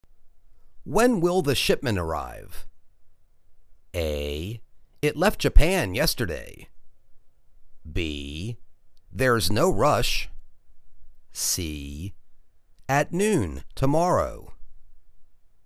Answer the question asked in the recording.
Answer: At noon tomorrow.